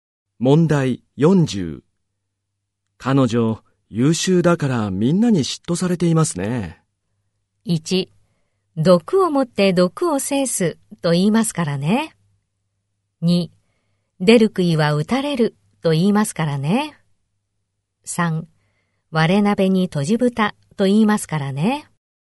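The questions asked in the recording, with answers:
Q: 彼女、優秀だからみんなに嫉妬されていますね。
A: 2: 出る杭は打たれると言いますからね。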